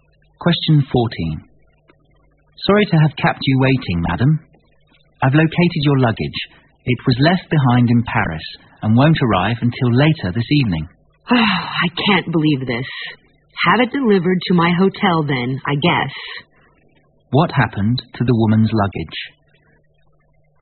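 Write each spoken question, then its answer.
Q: What happened to the woman's luggage?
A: It was left behind in Paris and won't arrive until later that evening.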